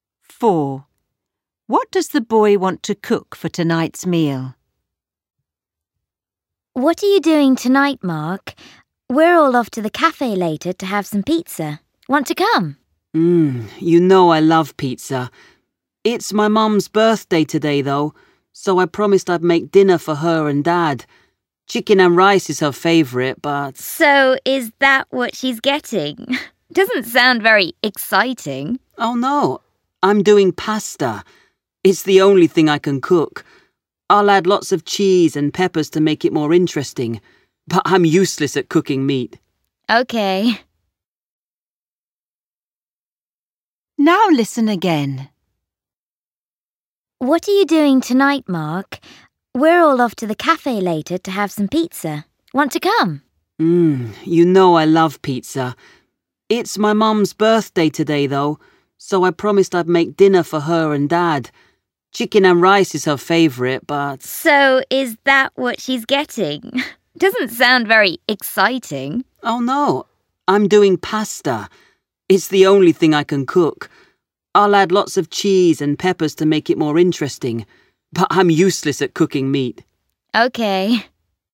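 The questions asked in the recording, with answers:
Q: What does the boy want to cook for tonight's meal?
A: Pasta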